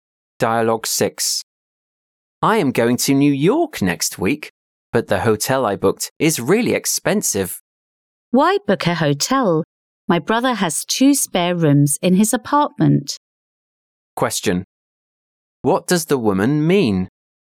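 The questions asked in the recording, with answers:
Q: What does the woman mean?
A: The man can stay at her brother's apartment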